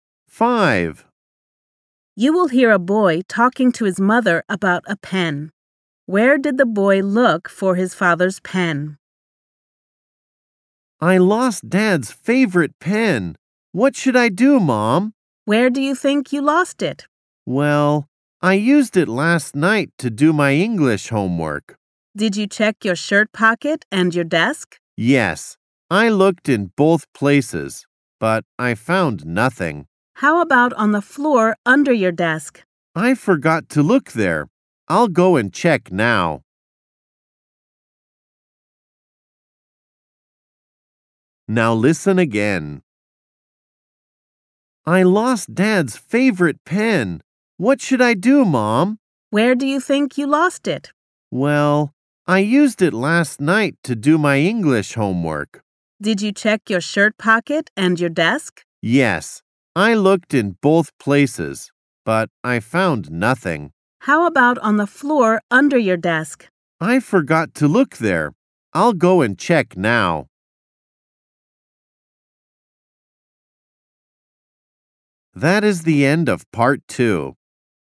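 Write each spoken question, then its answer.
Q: Where did the boy look for his father's pen?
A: In his shirt pocket and his desk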